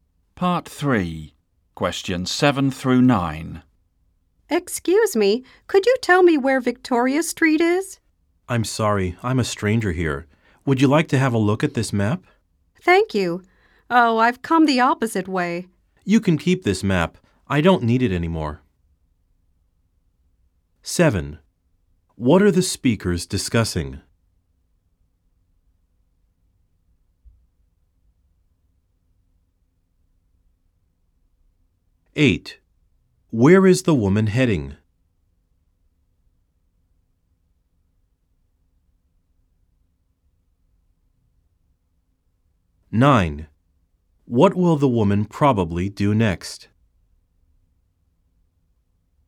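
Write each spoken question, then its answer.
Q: What are the speakers discussing?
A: Directions to Victoria Street

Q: Where is the woman heading?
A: Victoria Street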